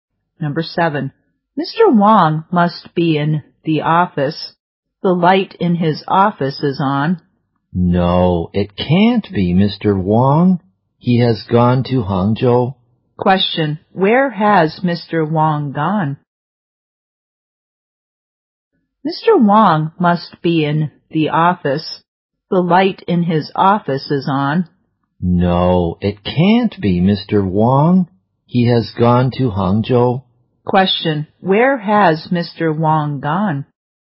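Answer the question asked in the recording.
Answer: Hangzhou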